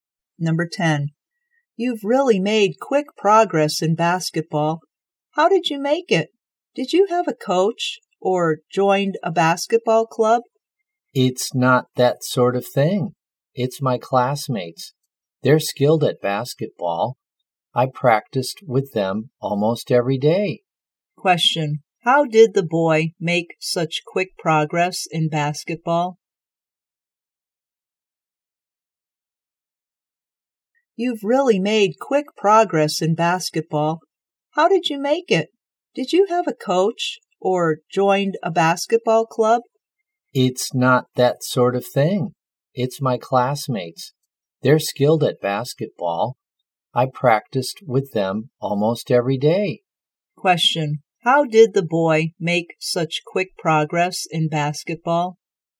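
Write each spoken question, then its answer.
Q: How did the boy make such quick progress in basketball?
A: By practicing with his classmates almost every day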